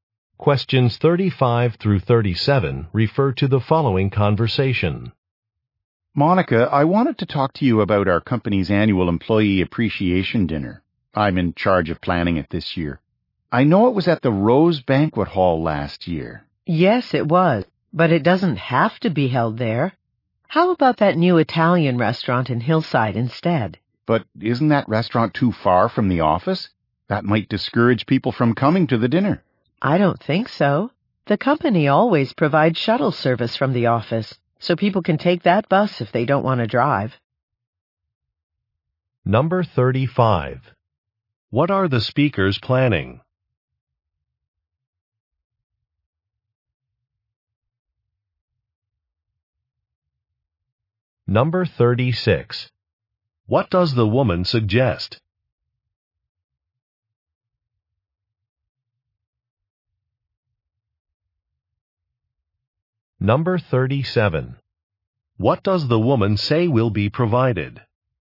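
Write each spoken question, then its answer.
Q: What are the speakers planning?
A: The annual employee appreciation dinner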